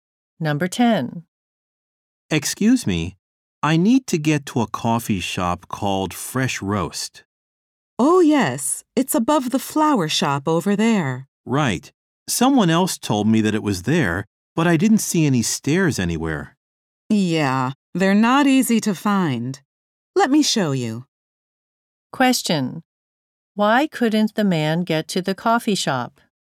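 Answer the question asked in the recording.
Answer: He couldn't find the stairs.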